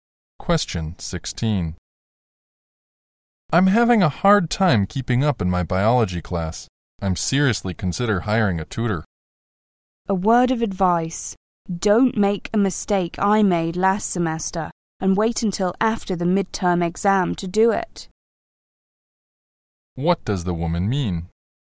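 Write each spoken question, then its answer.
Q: What does the woman mean?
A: He should hire a tutor right away, before the midterm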